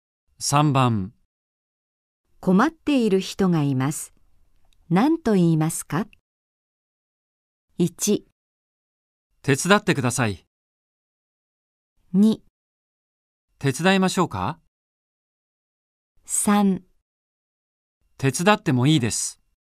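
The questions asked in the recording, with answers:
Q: 困っている人がいます。何と言いますか?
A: 2: 手伝いましょうか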